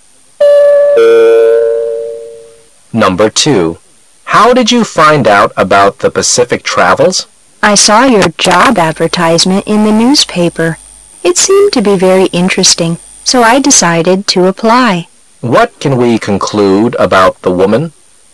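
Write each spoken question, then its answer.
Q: What can we conclude about the woman?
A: She is applying for a job at Pacific Travels.

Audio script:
[解析] M: How did you find out about the Pacific Travels? W: I saw your job advertisement in the newspaper. It seemed to be very interesting so I decided to apply. Q: What can we conclude about the woman?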